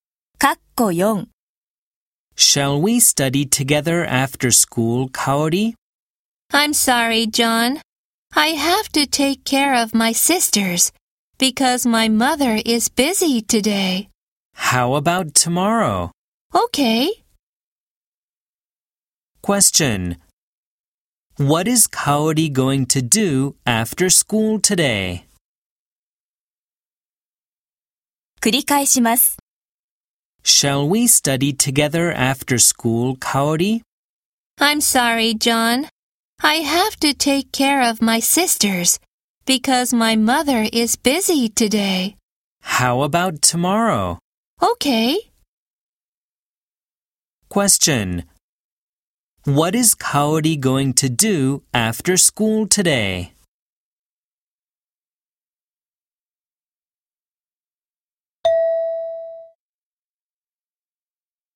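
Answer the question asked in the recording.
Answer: Take care of her sisters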